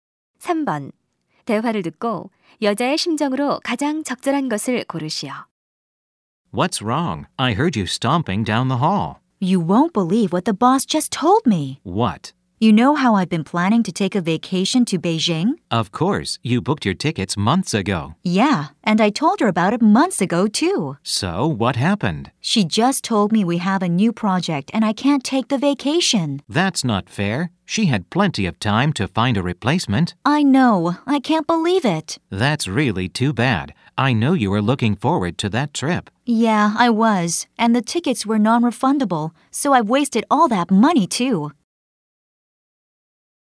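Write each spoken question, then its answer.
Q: 대화를 듣고 여자의 심정으로 가장 적절한 것을 고르시오.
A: 화남, 속상함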